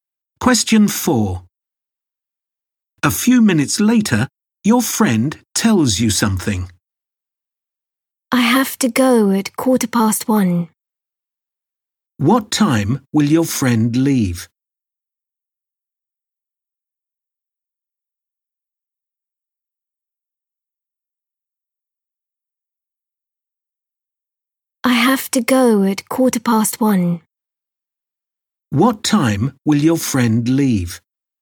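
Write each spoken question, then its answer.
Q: What time will your friend leave?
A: 1:15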